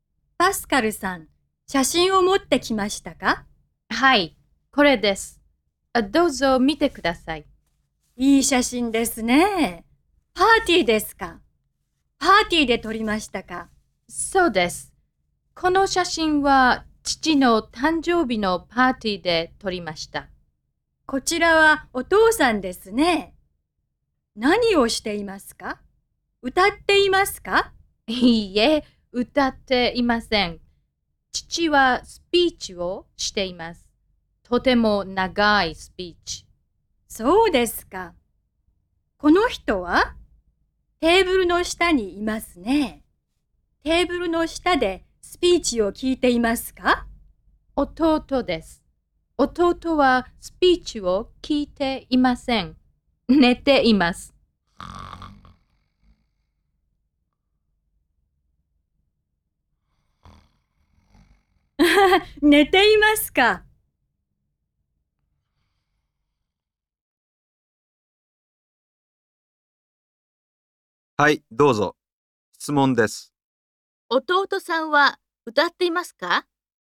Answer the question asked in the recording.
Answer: いいえ、歌っていません。